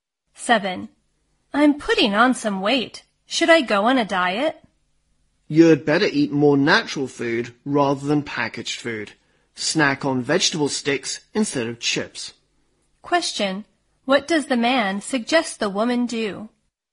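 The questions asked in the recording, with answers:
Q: What does the man suggest the woman do?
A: Eat more natural food, like vegetable sticks instead of chips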